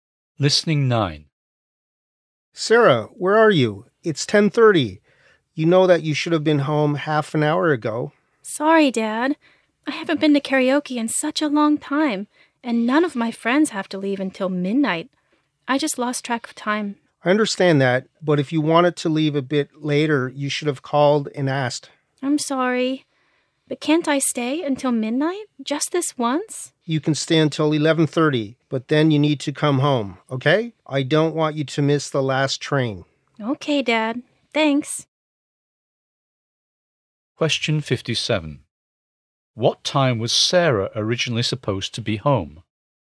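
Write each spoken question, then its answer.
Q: What time was Sarah originally supposed to be home?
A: 10:00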